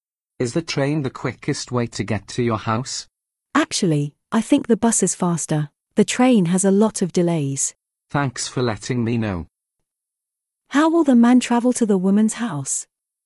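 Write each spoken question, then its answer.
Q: How will the man travel to the woman's house?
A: By bus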